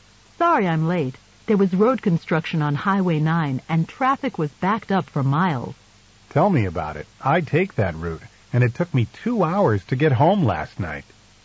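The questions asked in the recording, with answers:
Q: What does the man mean?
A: He was also held up by the traffic on Highway 9.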